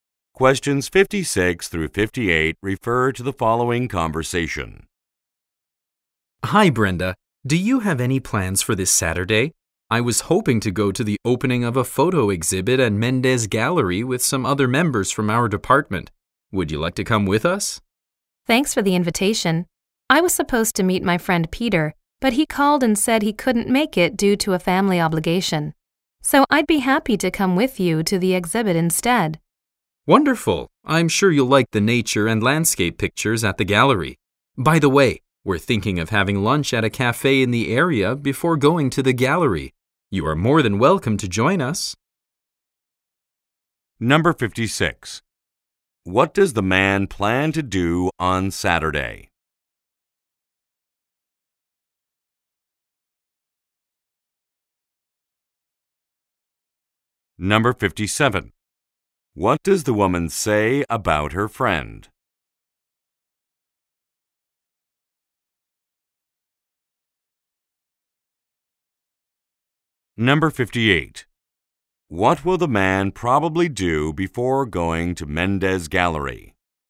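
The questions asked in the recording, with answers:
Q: What does the man plan to do on Saturday?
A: Go to a photo exhibit opening

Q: What does the woman say about her friend?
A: He canceled due to a family obligation

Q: What will the man probably do before going to Mendez Gallery?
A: Have lunch at a cafe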